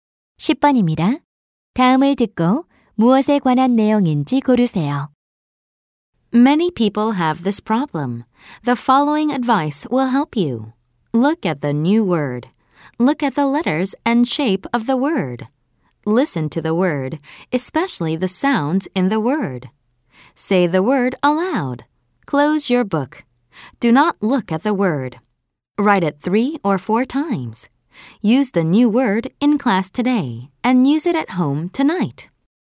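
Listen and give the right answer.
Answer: 새 단어를 익히는 방법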